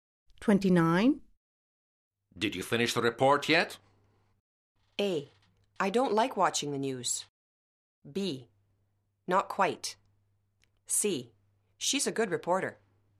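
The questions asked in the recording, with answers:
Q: Did you finish the report yet?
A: B: Not quite.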